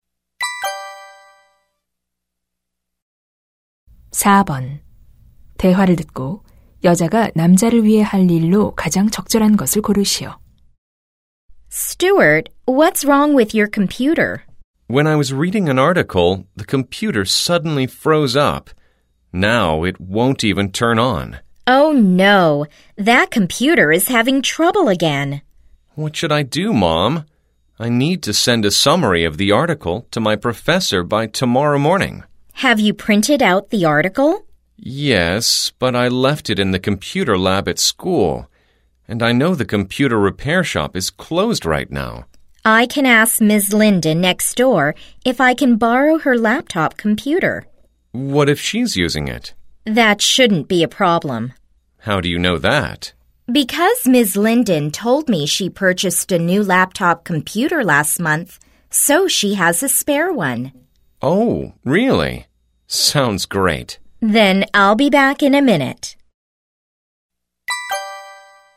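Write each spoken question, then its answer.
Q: 여자가 남자를 위해 할 일로 가장 적절한 것을 고르시오.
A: 이웃에게 노트북 컴퓨터 빌리기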